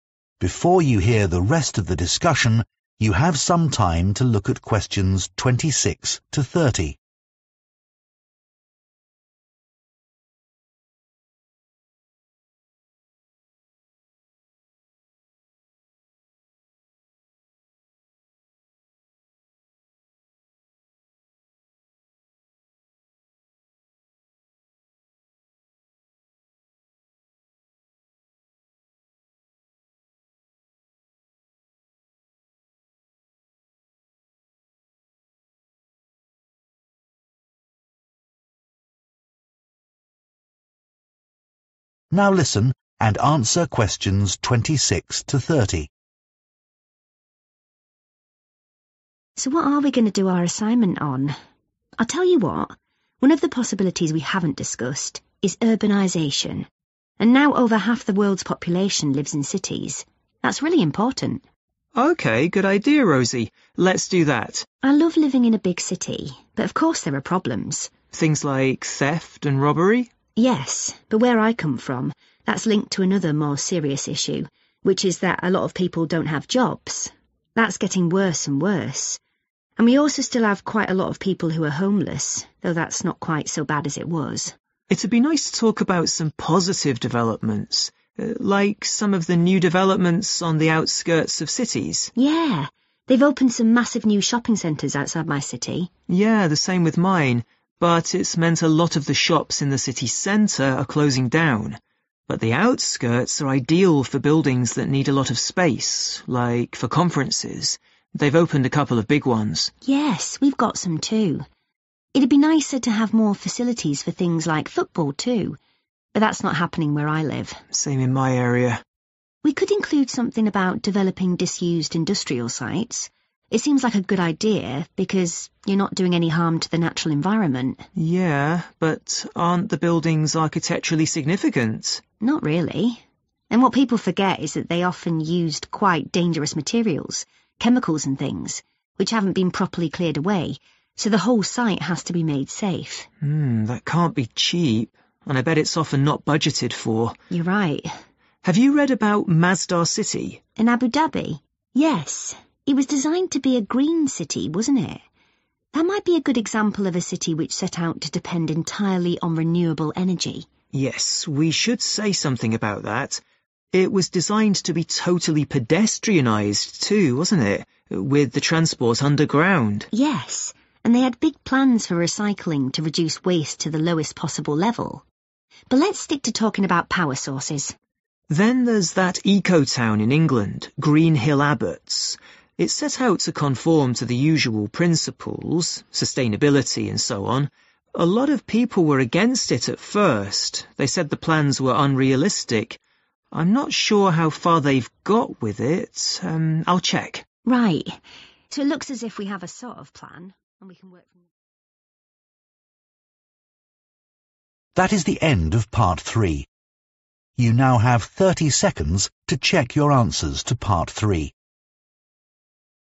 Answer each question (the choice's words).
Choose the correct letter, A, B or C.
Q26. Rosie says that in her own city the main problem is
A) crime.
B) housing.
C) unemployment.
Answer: unemployment.

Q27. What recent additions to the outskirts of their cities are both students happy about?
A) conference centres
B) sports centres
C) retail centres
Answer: conference centres

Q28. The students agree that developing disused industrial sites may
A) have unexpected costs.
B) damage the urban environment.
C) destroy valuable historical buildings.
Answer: have unexpected costs.

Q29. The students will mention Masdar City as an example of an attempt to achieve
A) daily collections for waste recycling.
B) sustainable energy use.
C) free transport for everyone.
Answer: sustainable energy use.

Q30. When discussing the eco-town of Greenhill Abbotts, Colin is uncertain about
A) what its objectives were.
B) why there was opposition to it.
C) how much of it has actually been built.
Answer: how much of it has actually been built.